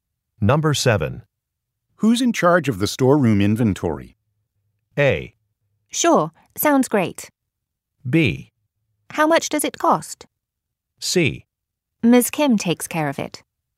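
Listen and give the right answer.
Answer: C: Ms. Kim takes care of it.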